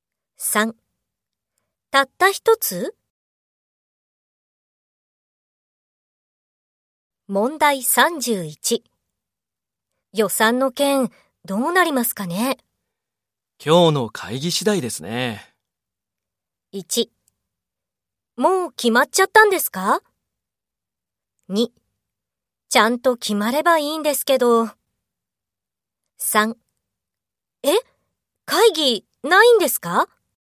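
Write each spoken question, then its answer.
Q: 予算の件、どうなりますかね?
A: 2: ちゃんと決まればいいんですけど。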